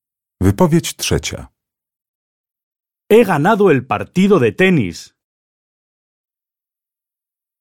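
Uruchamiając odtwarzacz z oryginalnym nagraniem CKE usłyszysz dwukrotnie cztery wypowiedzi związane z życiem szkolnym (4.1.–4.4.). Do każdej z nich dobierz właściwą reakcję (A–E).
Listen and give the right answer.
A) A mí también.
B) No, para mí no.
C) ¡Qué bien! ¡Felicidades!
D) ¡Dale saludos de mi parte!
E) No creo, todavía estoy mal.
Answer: C) ¡Qué bien! ¡Felicidades!

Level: egzamin ósmoklasisty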